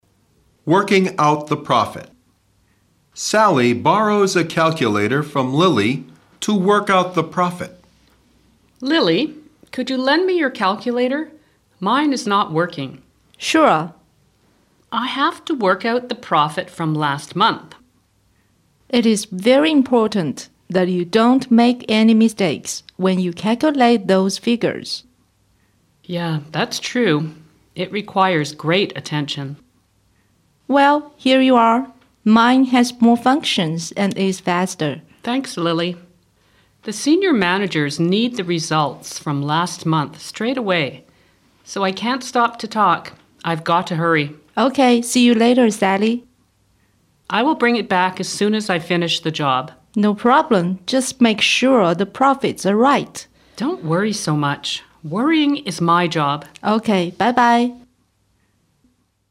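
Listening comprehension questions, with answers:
二、听力理解:请听下面的对话,根据对话内容进行判断,正确为"T",错误为"F"。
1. Lily's calculator is not working.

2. Lily's calculator has more functions and is faster.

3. Sally has to work out the profit from last year.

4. Calculating figures requires great attention.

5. Sally will return the calculator as soon as she finishes the job.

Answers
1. F
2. T
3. F
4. T
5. T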